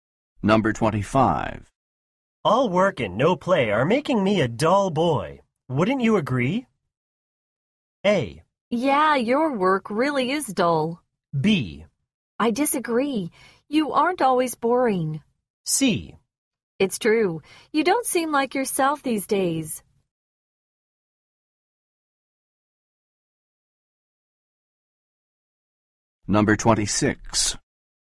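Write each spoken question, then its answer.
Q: All work and no play are making me a dull boy.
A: C: It's true. You don't seem like yourself these days.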